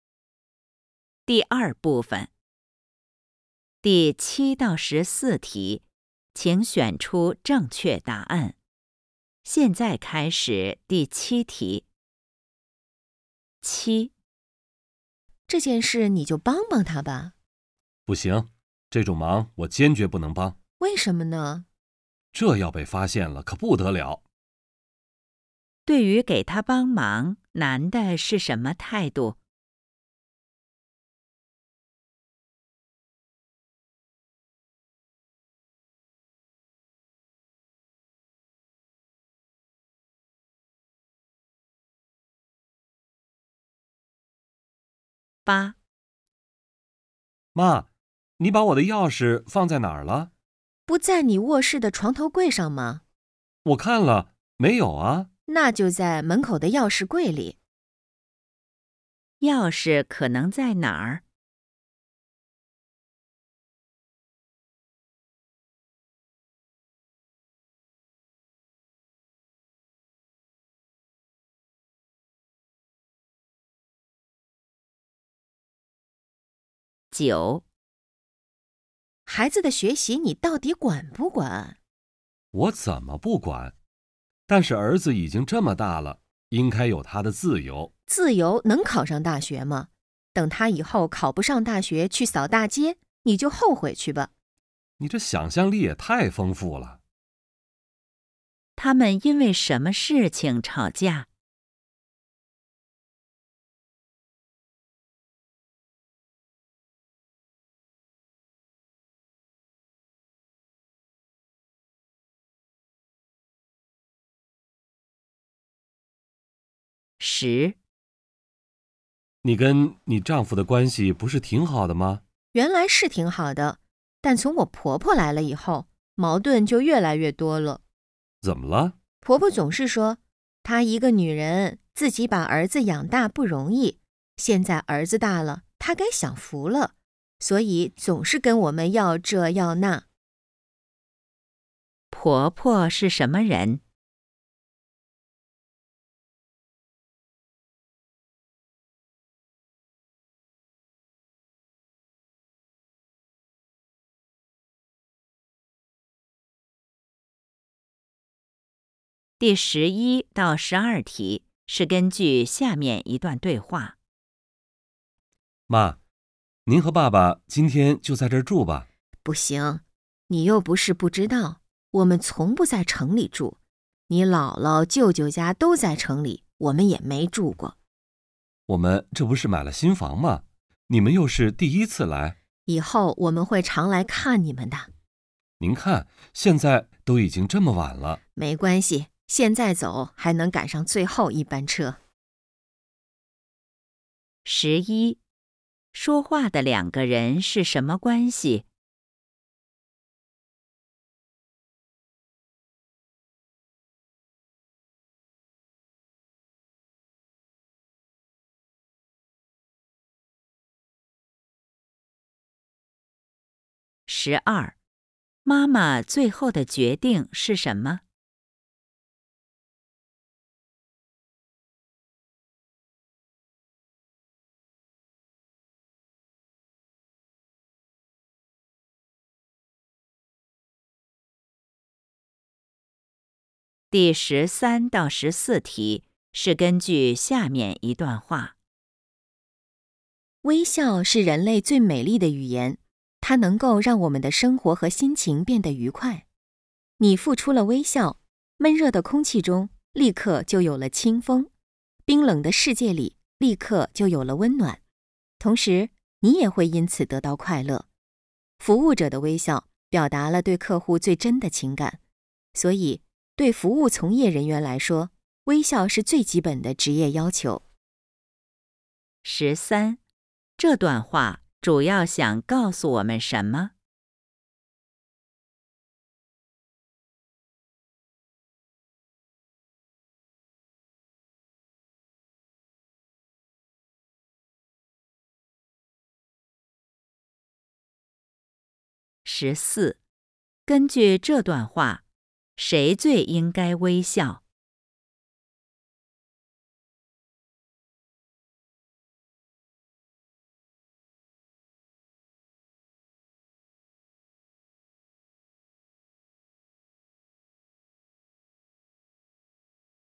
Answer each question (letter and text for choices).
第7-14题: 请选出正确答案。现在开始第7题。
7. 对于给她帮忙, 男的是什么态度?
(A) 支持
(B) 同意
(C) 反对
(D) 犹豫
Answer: (C) 反对

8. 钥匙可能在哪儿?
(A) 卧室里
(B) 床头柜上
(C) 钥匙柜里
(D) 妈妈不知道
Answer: (C) 钥匙柜里

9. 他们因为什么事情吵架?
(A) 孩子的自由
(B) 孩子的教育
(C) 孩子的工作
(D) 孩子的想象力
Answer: (B) 孩子的教育

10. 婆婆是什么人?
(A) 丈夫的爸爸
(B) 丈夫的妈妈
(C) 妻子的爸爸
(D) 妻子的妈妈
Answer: (B) 丈夫的妈妈

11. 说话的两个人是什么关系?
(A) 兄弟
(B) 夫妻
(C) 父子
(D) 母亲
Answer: (D) 母亲

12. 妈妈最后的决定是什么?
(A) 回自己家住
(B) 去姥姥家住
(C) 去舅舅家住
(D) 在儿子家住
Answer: (A) 回自己家住

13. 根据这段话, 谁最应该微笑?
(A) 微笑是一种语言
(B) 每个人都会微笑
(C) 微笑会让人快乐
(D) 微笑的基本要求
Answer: (C) 微笑会让人快乐

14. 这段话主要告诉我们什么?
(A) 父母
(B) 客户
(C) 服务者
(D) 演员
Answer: (C) 服务者

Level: HSK5